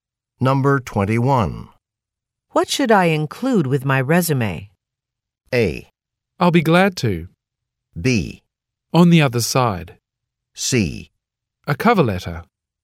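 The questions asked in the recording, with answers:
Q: What should I include with my resume?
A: C: A cover letter.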